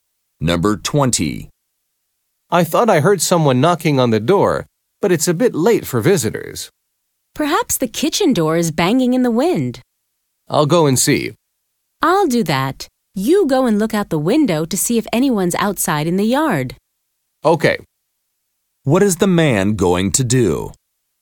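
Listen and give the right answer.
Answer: Look out the window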